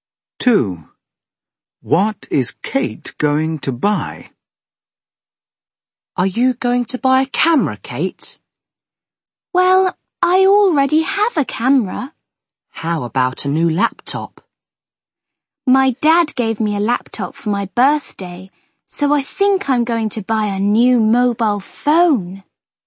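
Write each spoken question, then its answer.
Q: What is Kate going to buy?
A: a new mobile phone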